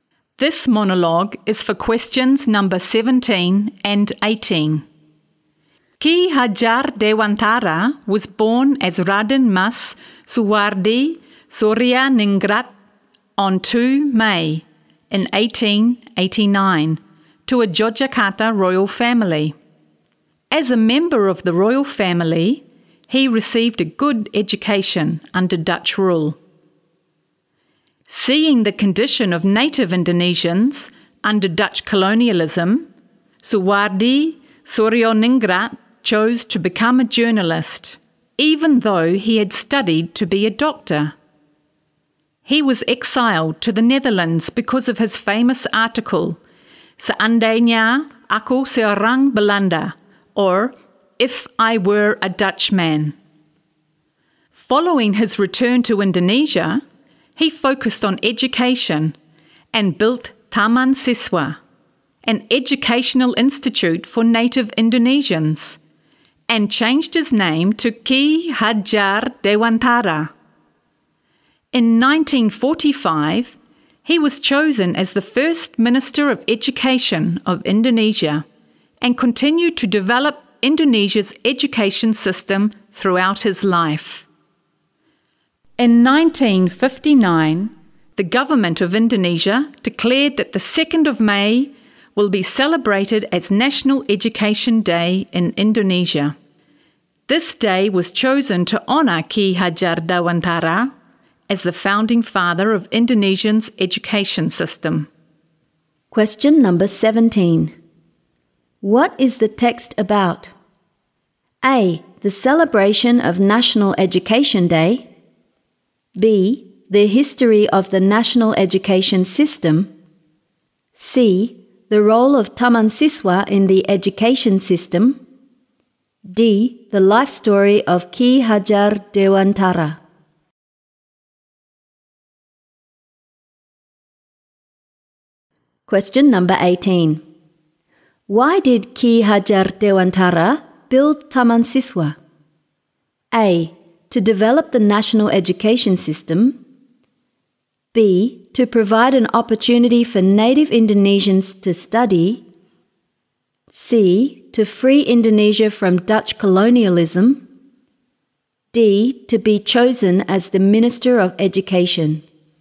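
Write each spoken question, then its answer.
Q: What is the text about?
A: D: The life story of Ki Hajar Dewantara.

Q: Why did Ki Hajar Dewantara build Taman Siswa?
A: B: To provide an opportunity for native Indonesians to study.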